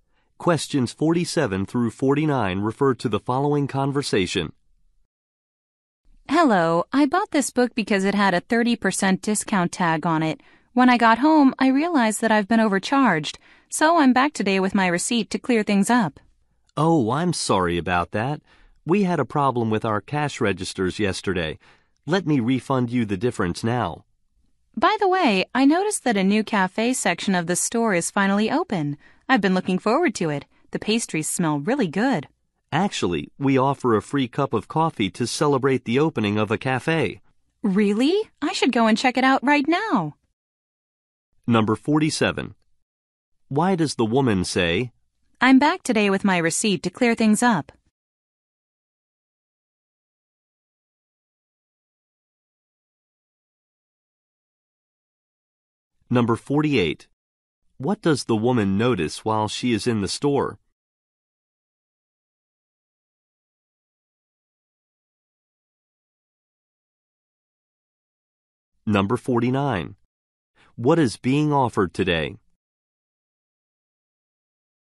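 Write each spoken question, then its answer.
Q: What does the woman notice while she is in the store?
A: A new cafe section has opened

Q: What is being offered today?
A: A free cup of coffee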